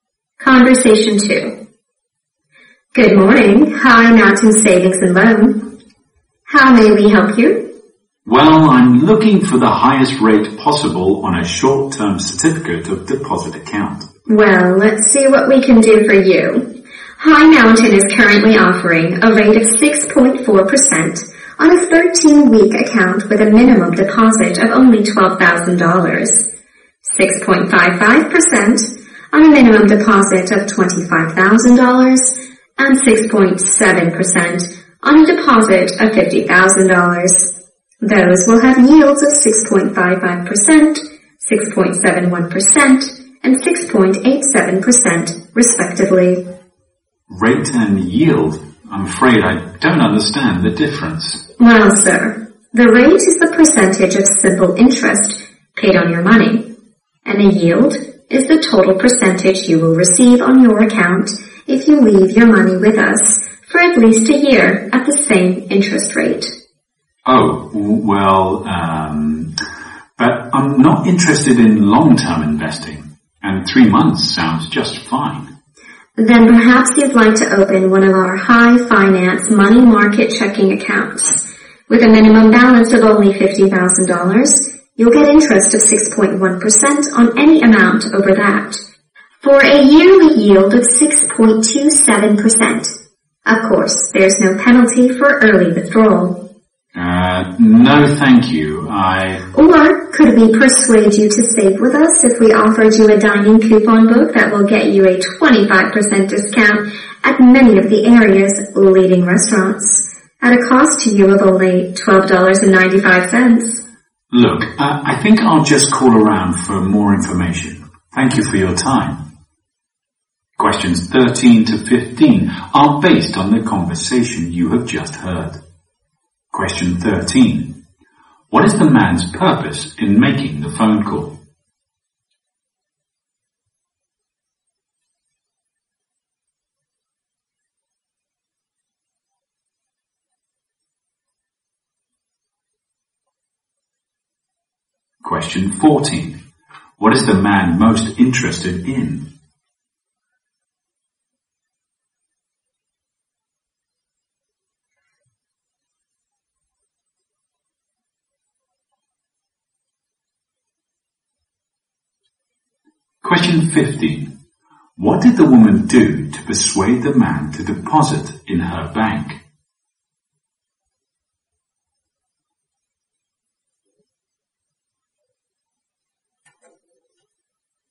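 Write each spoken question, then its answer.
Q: What is the man's purpose in making the phone call?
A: To find the highest rate on a short-term certificate of deposit

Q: What is the man most interested in?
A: A short-term (3-month) deposit with a high rate

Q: What did the woman do to persuade the man to deposit in her bank?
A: She offered him a restaurant coupon book with 25% off.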